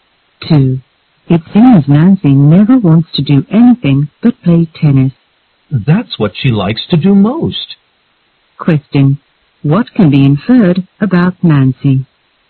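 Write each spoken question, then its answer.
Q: What can be inferred about Nancy?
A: She likes playing tennis most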